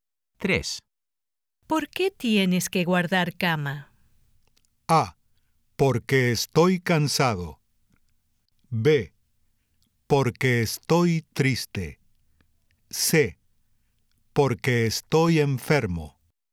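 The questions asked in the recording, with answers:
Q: ¿Por qué tienes que guardar cama?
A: C: Porque estoy enfermo.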